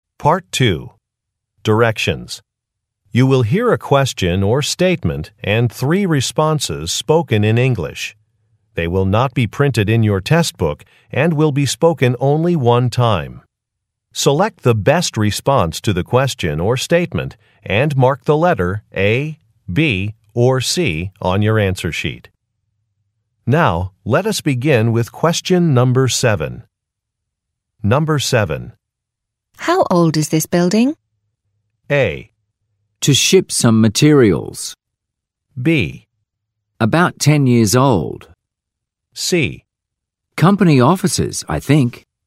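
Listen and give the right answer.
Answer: About 10 years old.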